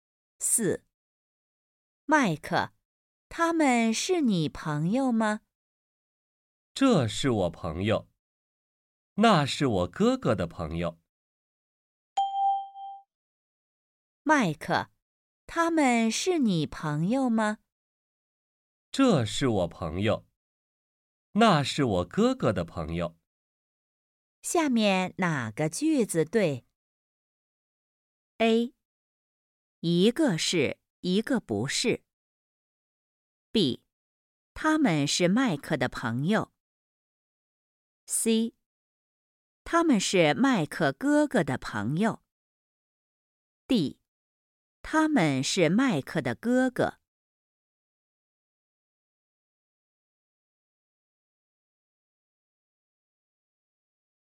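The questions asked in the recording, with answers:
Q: 下面哪个句子对?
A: A: 一个是,一个不是。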